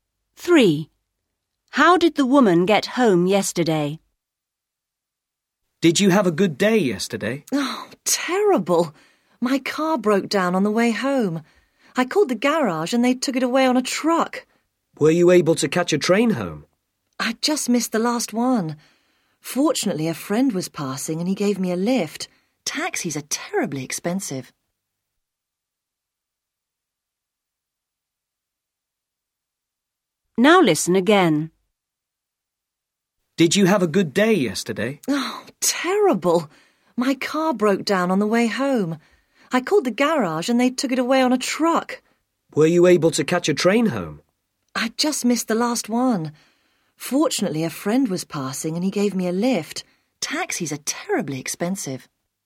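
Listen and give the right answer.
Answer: A friend gave her a lift in his car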